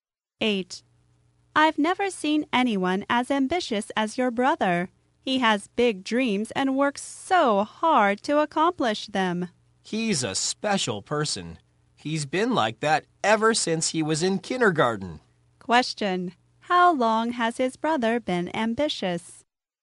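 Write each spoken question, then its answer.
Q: how long has his brother been ambitious?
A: Since he was in kindergarten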